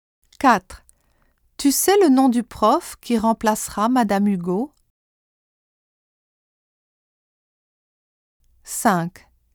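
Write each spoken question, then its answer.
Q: Tu sais le nom du prof qui remplacera Madame Hugo?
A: qui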